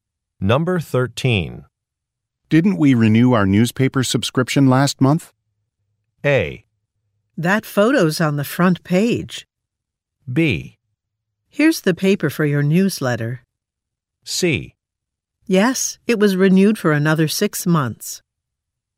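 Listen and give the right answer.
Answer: C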